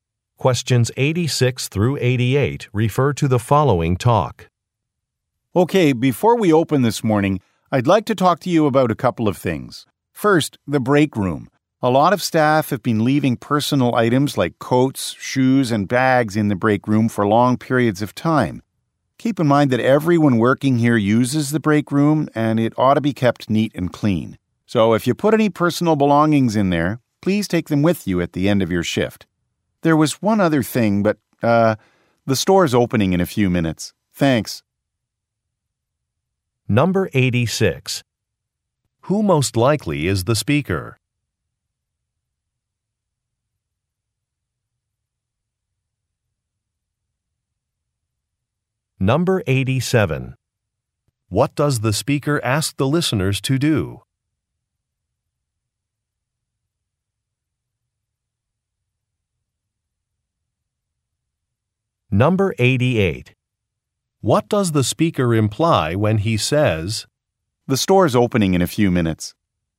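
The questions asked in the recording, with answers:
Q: What does the speaker ask the listeners to do?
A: Take their personal belongings from the break room at the end of their shift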